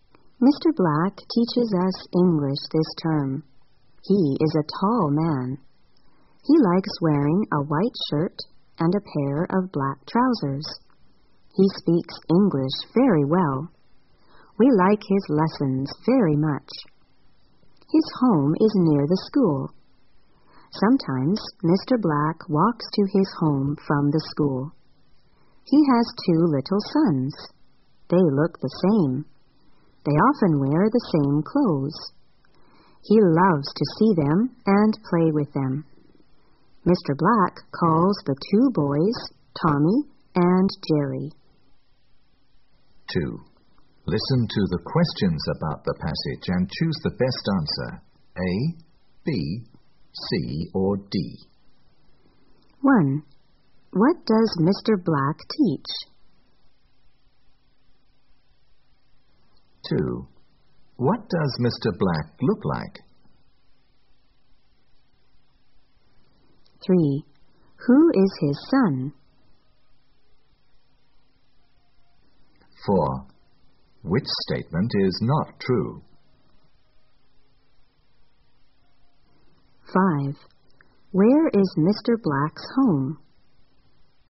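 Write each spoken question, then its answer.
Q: What does Mr. Black teach?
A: English

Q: What does Mr. Black look like?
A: He is a tall man who likes wearing a white shirt and black trousers

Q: Where is Mr. Black's home?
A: Near the school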